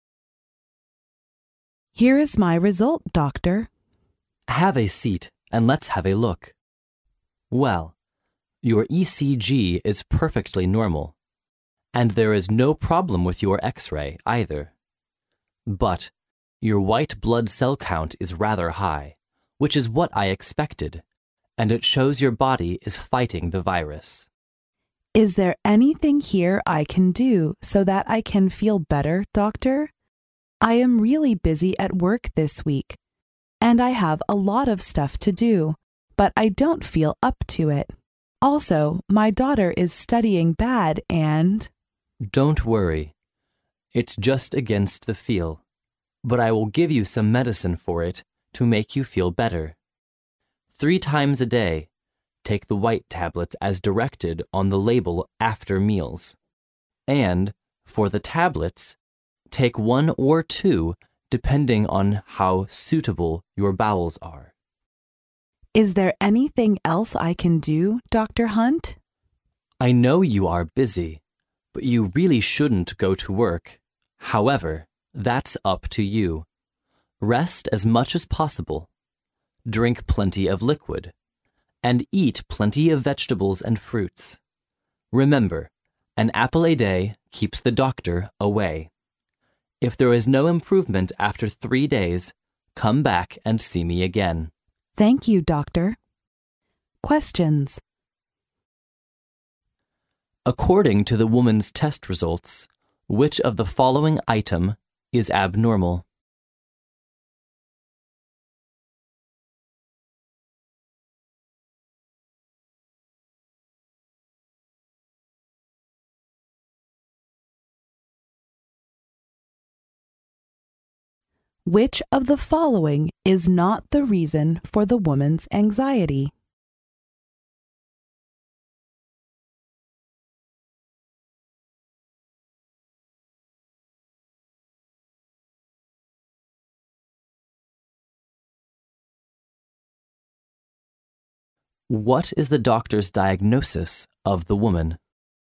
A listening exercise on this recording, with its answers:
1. Which of the following is not the reason for the woman's anxiety?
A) Too much work to do.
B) A heavy load of studying.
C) Her daughter's sickness.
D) Her insufficient income.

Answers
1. D

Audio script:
[听力原文] P: Here is my result, doctor. D: Have a seat, and let's have a look. Well, your ECG is perfectly normal, and there is no problem with your X-ray, either. But your white blood cell count is rather high, which is what I expected, and it shows your body is fighting the virus. P: Is there anything here I can do so that I can feel better, doctor? I am really busy at work this week. And I have a lot of stuff to do, but I don't feel opt to it. Also my daughter is studying bad and... D: Don't worry. It's just against the feel. But I will give you some medicine for it to make you feel better. Three times a day take the white tablets as directed on the label after meals. And for the (...) tablets, take one or two depending on how suitable your bowels are. P: Is there anything else I can do, Doctor Hunt? D: I know you are busy, but you really shouldn't go to work. However, that's up to you. Rest as much as possible, drink plenty of liquid, and eat plenty of vegetables and fruits. Remember, an apple a day keeps the doctor away. If there is no improvement after three days, come back and see me again. P: Thank you, doctor.
According to the women's test results, which of the following item is abnormal?

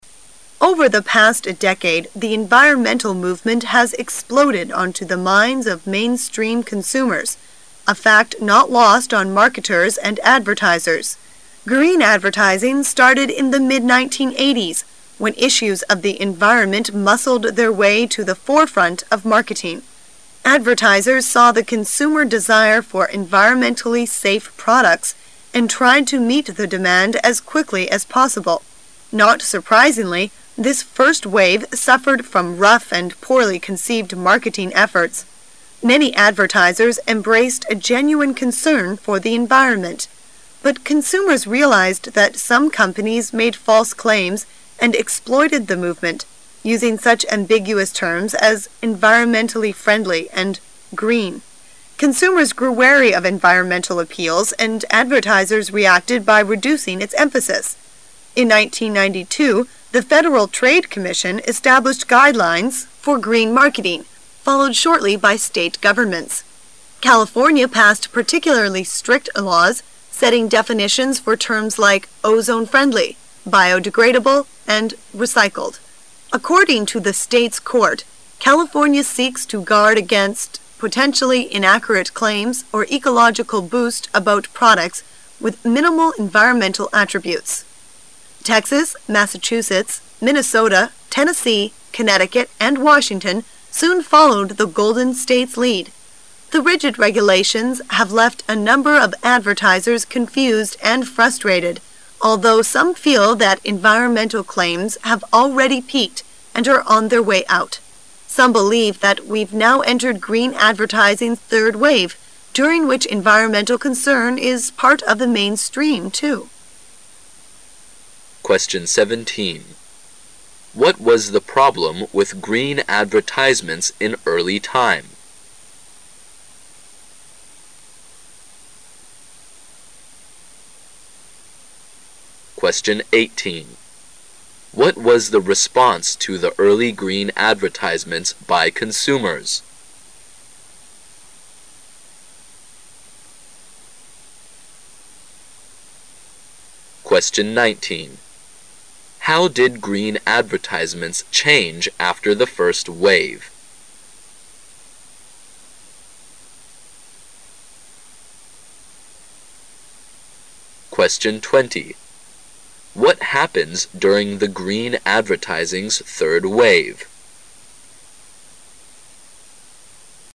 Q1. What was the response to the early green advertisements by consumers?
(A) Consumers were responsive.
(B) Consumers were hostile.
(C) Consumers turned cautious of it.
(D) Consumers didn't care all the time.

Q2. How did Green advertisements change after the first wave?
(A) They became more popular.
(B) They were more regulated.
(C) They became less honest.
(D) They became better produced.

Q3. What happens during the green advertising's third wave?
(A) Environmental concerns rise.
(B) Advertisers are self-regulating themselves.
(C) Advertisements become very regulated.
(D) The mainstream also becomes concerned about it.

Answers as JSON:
{"1": "C", "2": "B", "3": "D"}

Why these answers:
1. 细节题。紧接上题信息:Consumers grew wary of environmental appeals...利用前文提到的信息即可先排除[D]"他们不关心"。wary的意思是"机警的,谨慎的",对应[C]项中的cautious,所以选[C]"人们对之提高了警惕"。

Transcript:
[解析] 17-20 Over the past decade, the environmental movement has exploded onto the minds of mainstream consumers, a fact not lost on marketers and advertisers. Green advertising started in the mid-1980s when issues of the environment muscled their way to the forefront of marketing. Advertisers saw the consumer desire for environmentally safe products and tried to meet the demand as quickly as possible. Not surprisingly, this first wave suffered from rough and poorly conceived marketing efforts. Many advertisers embraced a genuine concern for the environment. But consumers realized that some companies made false claims and exploited the movement, using such ambiguous terms as "environmentally friendly" and "green." Consumers grew wary of environmental appeals, and advertisers reacted by reducing its emphasis. In 1992 the Federal Trade Commission established guidelines for green marketing, followed shortly by state governments. California passed particularly strict laws, setting definitions for terms like "ozone friendly". "biodegradable", and "recycled''. According to the state's court, "California seeks to guard against... potentially inaccurate claims or ecological boost about products with minimal environmental attributes." Texas. Massachusetts, Minnesota, Tennessee, Connecticut. and Washington soon followed the Golden State's lead. The rigid regulations have left a number of advertisers confused and frustrated, although some feel that environmental claims have already peaked and are on their way out. Some believe that we've now entered green advertising's third wave, during which environmental concern is part of the mainstream, too. 17.What was the problem with green advertisements in early time?

